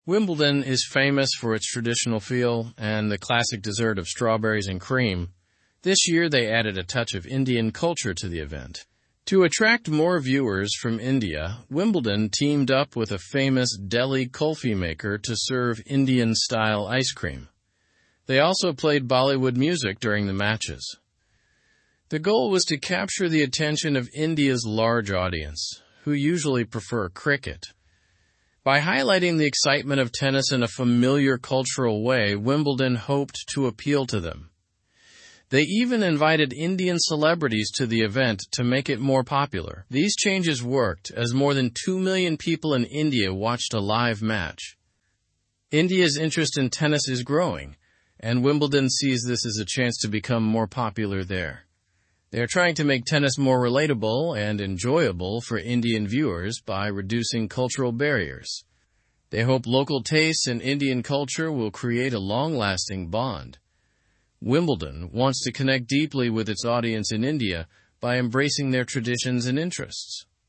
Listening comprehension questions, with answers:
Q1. What dessert is Wimbledon known for?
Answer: Strawberries and cream.

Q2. What did Wimbledon add this year to attract Indian viewers?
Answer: Indian-style ice cream and Bollywood music.

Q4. How did Wimbledon try to make tennis appealing to Indian audiences?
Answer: By including familiar cultural elements like music and foods.

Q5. How many Indian viewers watched Jannik Sinner's match?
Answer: More than two million.

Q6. Why were Indian celebrities and influencers invited to the event?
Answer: To widen Wimbledon's appeal in India.

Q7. What is Wimbledon's strategy to increase tennis popularity in India?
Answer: To make the sport more relatable by embracing Indian culture.

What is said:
Wimbledon is famous for its traditional feel and the classic dessert of strawberries and cream. This year, they added a touch of Indian culture to the event. To attract more viewers from India, Wimbledon teamed up with a famous Delhi kulfi maker to serve Indian-style ice cream. They also played Bollywood music during the matches.
The goal was to capture the attention of India's large audience, who usually prefer cricket. By highlighting the excitement of tennis in a familiar cultural way, Wimbledon hoped to appeal to them. They even invited Indian celebrities to the event to make it more popular. These changes worked, as more than two million people in India watched a live match.
India's interest in tennis is growing, and Wimbledon sees this as a chance to become more popular there. They're trying to make tennis more relatable and enjoyable for Indian viewers by reducing cultural barriers. They hope local tastes and Indian culture will create a long-lasting bond. Wimbledon wants to connect deeply with its audience in India by embracing their traditions and interests.

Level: Level 2